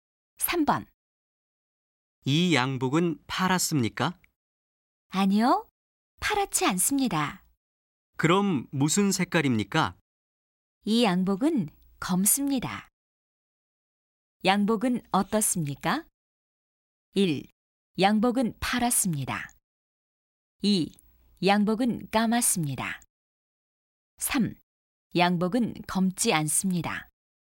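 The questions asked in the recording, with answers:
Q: 양복은 어떻습니까?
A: 2: 양복은 까맣습니다.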